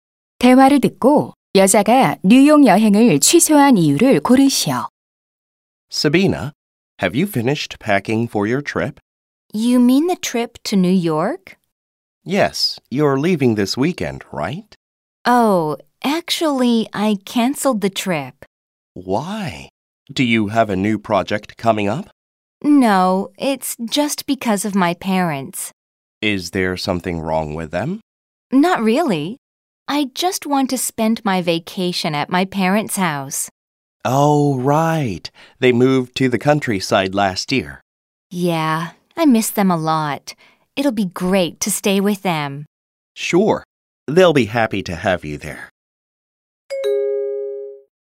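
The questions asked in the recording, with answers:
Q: 대화를 듣고 여자가 뉴욕 여행을 취소한 이유를 고르시오.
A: 부모님 댁에서 휴가를 보내고 싶어서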